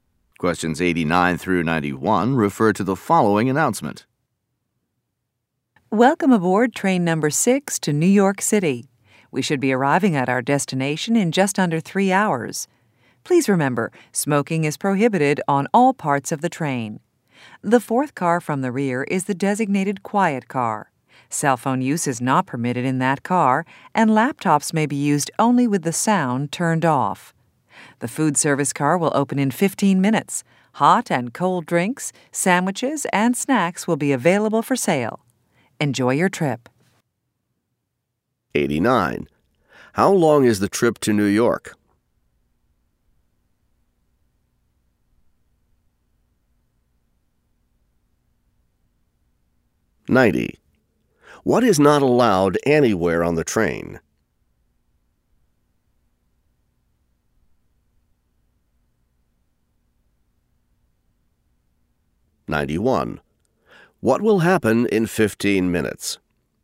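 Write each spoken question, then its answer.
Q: How long is the trip to New York?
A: Just under 3 hours

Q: What is not allowed anywhere on the train?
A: Smoking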